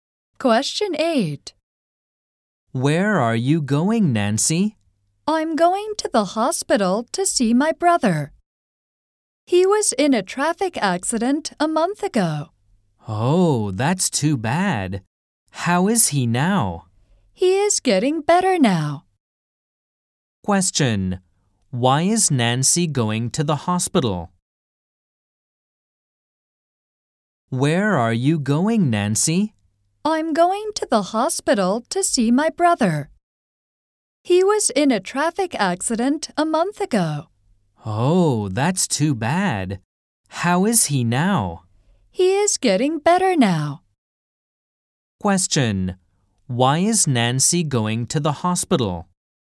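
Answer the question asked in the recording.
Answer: To see her brother, who was in a traffic accident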